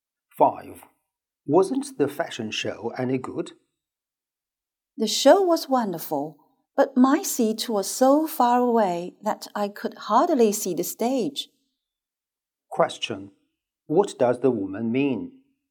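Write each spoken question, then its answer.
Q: What does the woman mean?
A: The show was wonderful, but her seat was too far away to see the stage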